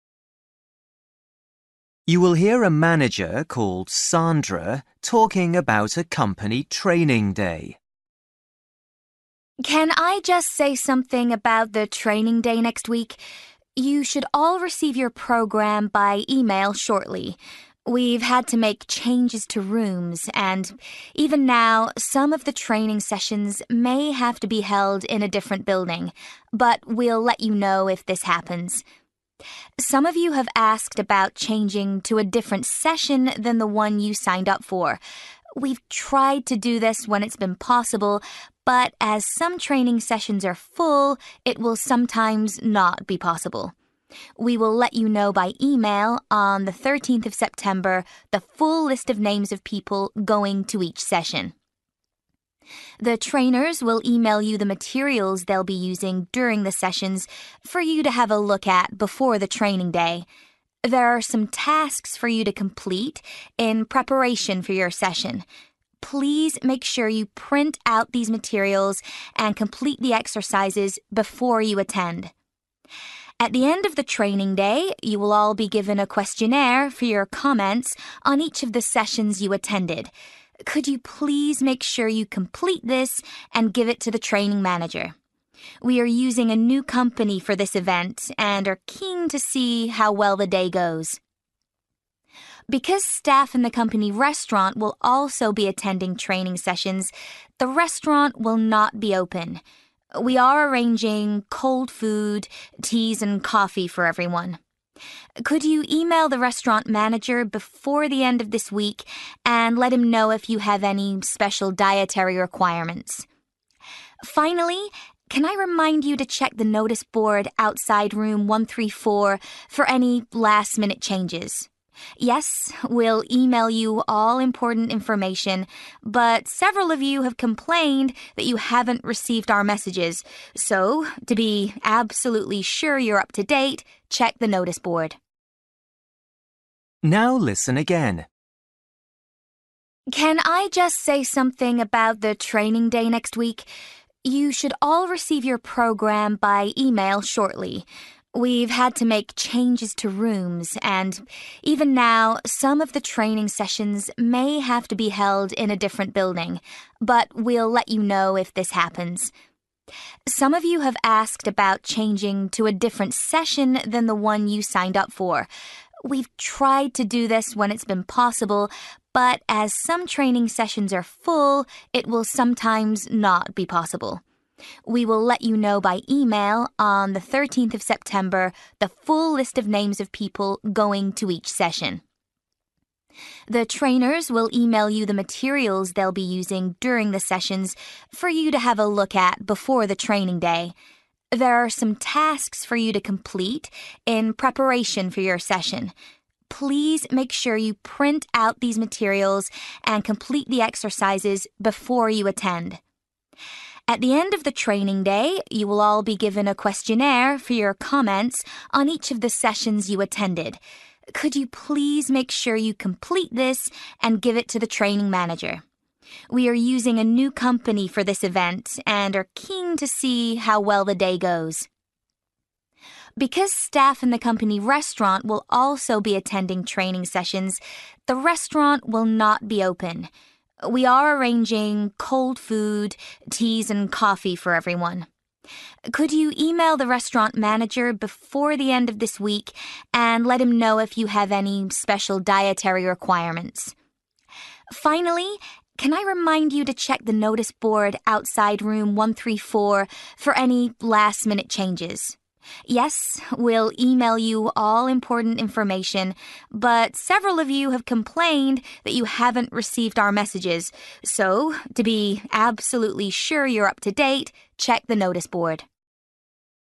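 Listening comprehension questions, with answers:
For each question, write the correct answer in the gap. Write one or two words or a number or a date or a time. You will hear a manager called Sandra talking about a company training day.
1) Some of the training sessions may take place in a (1) to the one in the programme.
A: different building

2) Your training sessions will be confirmed by email on (2)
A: 13th of September

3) Please complete the (3) in the materials before you come to the training event.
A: exercises

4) Please give your completed questionnaire to the (4) after the training day.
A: training manager

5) The (5) will be closed on the training day.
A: restaurant

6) Remember to check the noticeboard outside room (6) for any last-minute changes.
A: 134

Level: Luyện nghe trình độ B1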